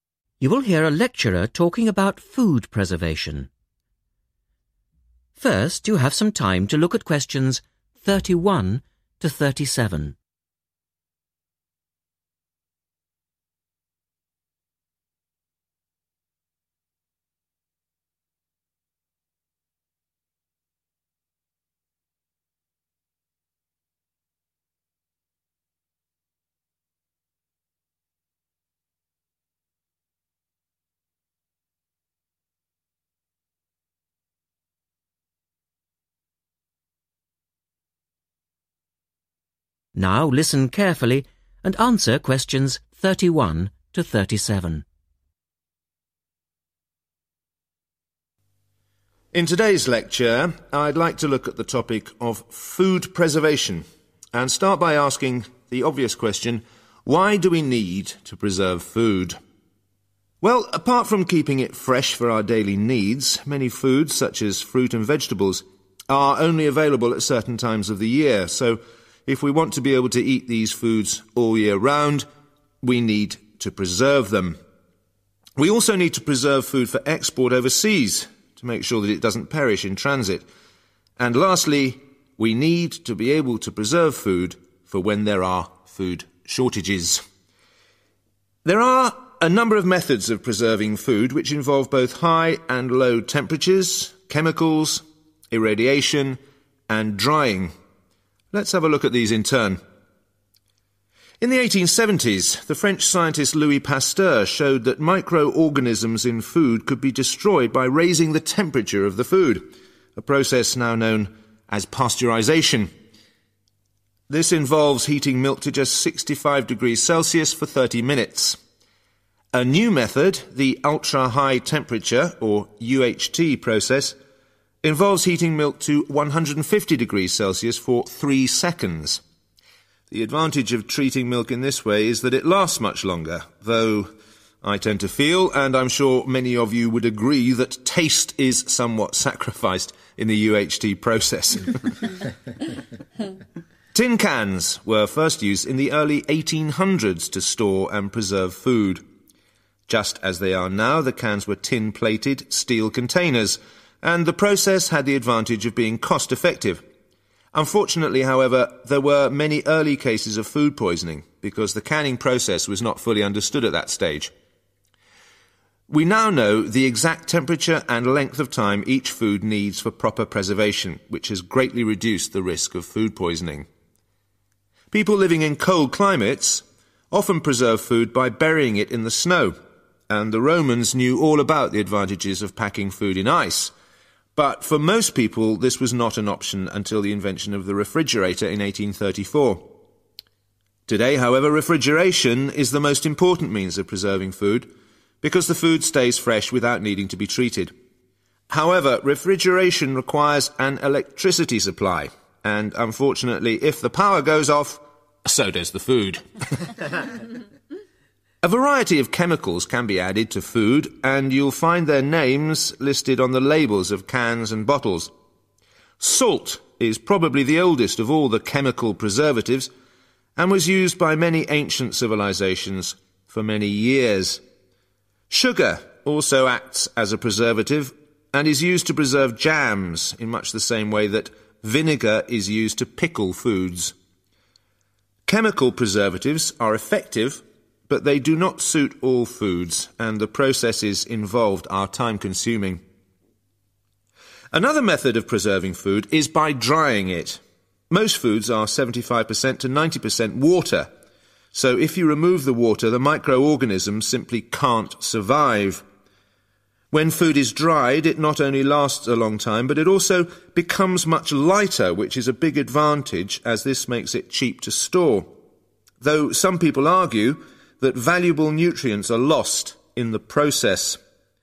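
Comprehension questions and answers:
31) For 31..............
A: export

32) In case of 32.............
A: food shortages

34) Risk of 34...............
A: food poisoning

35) Requires 35..............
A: electricity supply

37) Long-lasting, light and 37..............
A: cheap to store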